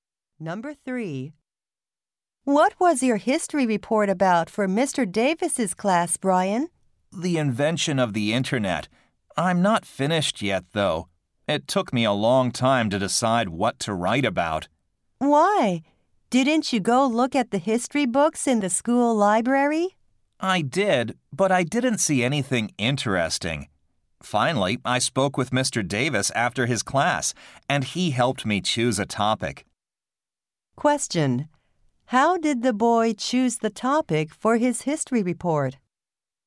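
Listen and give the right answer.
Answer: Mr. Davis helped him choose it.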